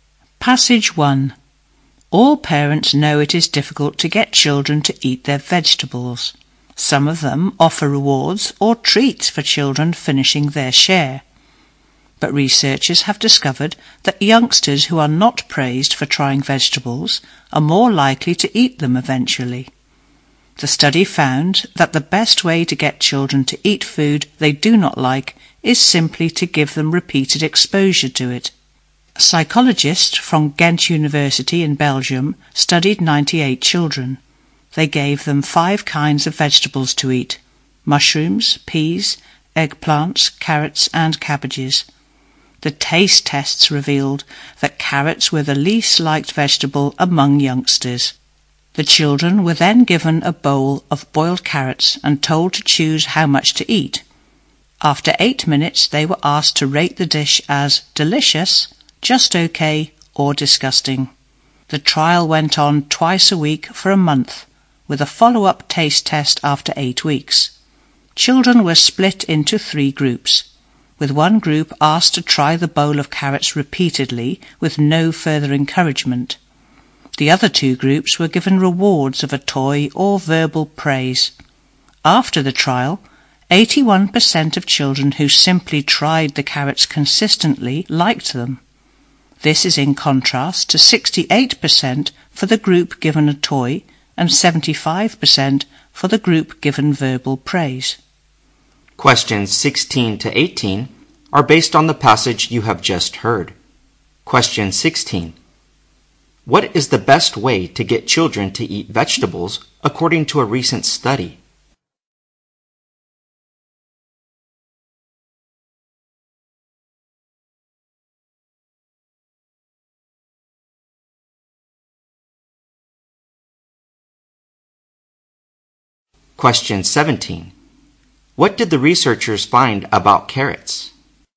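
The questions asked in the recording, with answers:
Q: What is the best way to get children to eat vegetables according to a recent study?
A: Give them repeated exposure to the vegetables.

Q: What did the researchers find about carrots?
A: Carrots were the vegetable children liked least.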